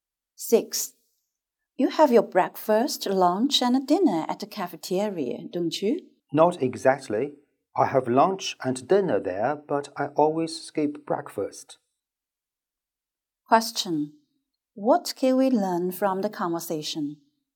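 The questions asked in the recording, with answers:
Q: What can we learn from the conversation?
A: The woman always skips breakfast and eats lunch and dinner at the cafeteria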